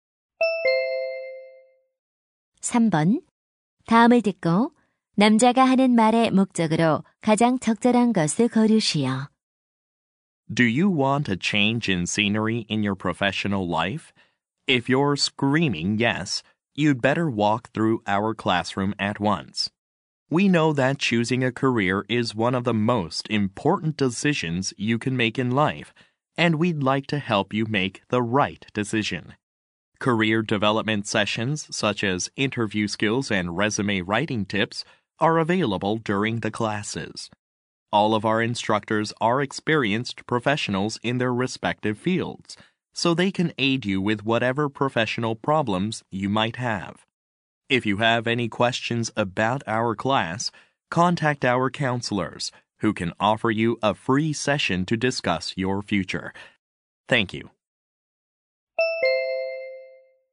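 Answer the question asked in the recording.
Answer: 진로 관련 강좌를 홍보하려고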